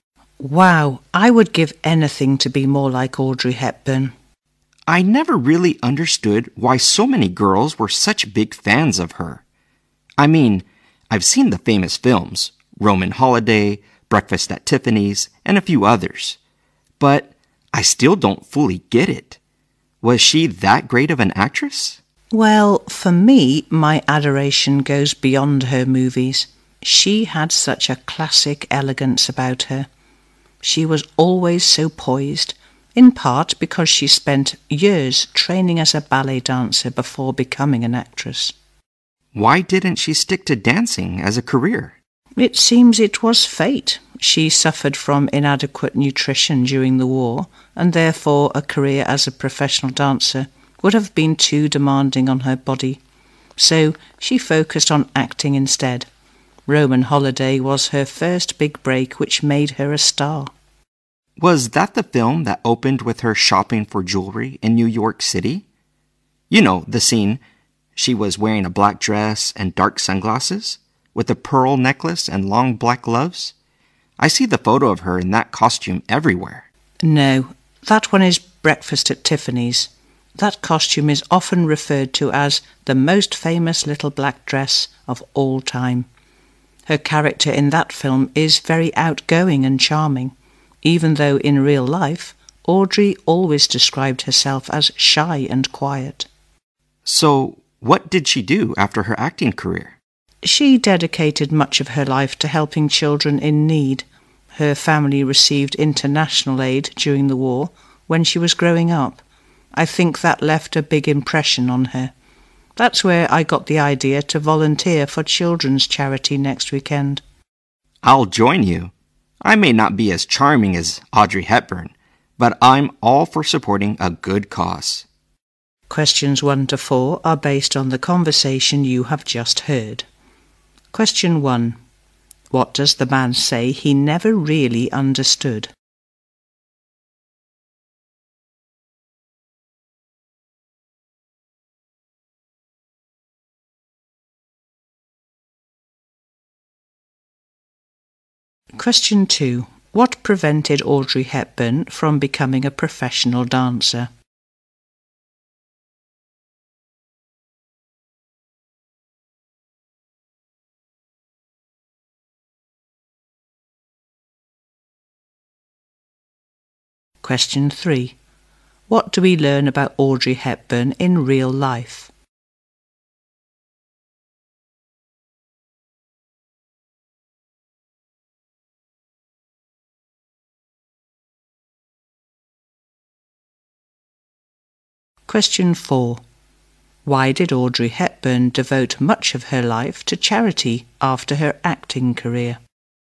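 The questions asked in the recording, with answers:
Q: What does the man say he never really understood?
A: Why so many girls were such big fans of Audrey Hepburn

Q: What prevented Audrey Hepburn from becoming a professional dancer?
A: Inadequate nutrition during the war made dancing too demanding on her body

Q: What do we learn about Audrey Hepburn in real life?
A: She described herself as shy and quiet

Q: Why did Audrey Hepburn devote much of her life to charity after her acting career?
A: Her family received international aid during the war when she was growing up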